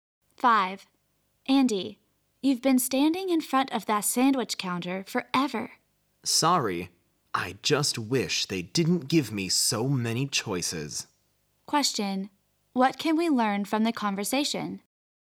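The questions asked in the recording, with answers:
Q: What can we learn from the conversation?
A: Andy can't decide which sandwich to choose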